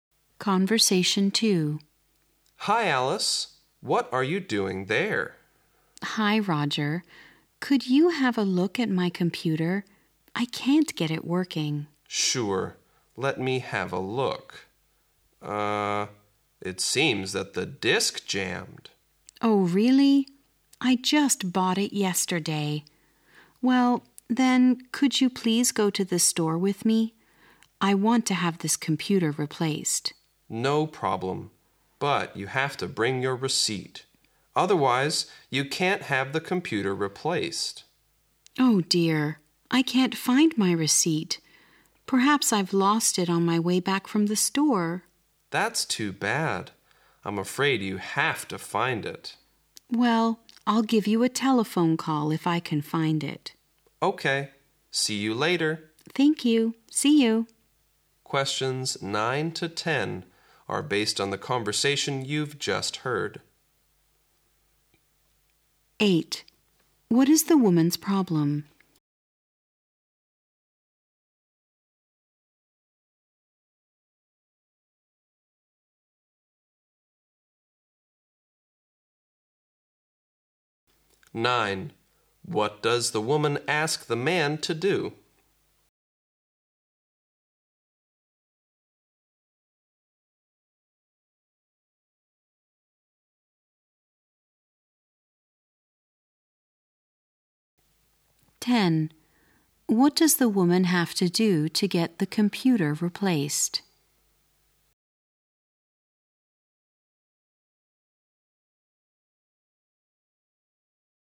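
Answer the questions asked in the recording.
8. Her new computer isn't working (the disk jammed)
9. Go to the store with her
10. Find her receipt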